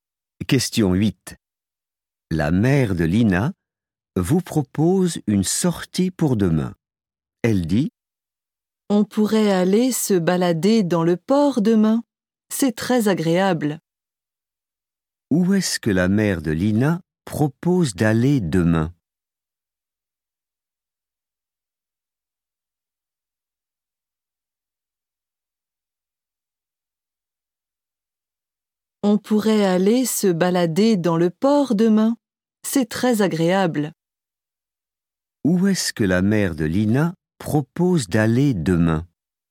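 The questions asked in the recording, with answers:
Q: Où est-ce que la mère de Lina propose d'aller demain?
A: au port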